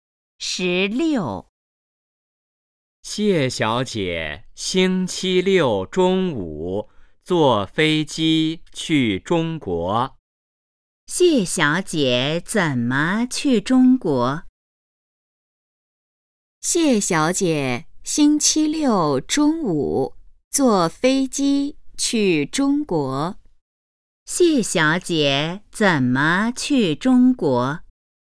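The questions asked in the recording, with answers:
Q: 谢小姐怎么去中国?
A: 坐飞机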